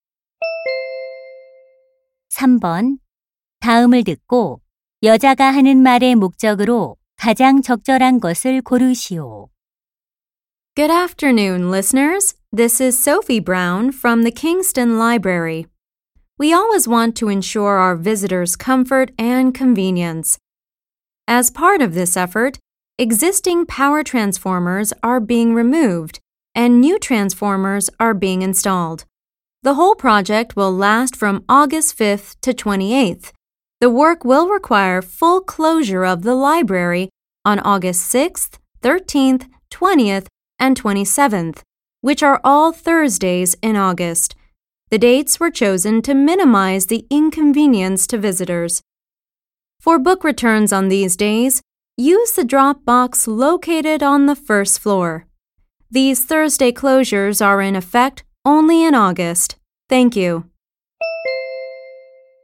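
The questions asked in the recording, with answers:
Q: 다음을 듣고 여자가 하는 말의 목적으로 가장 적절한 것을 고르시오.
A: 변압기 교체 공사로 인한 8월 목요일 도서관 휴관을 안내하려고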